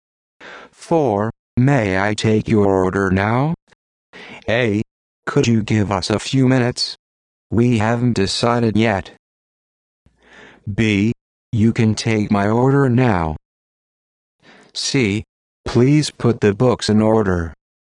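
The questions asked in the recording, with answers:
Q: May I take your order now?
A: A: Could you give us a few minutes? We haven't decided yet.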